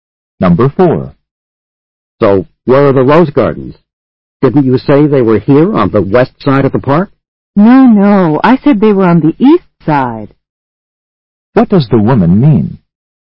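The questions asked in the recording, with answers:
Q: What does the woman mean?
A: The rose gardens are on the east side of the park.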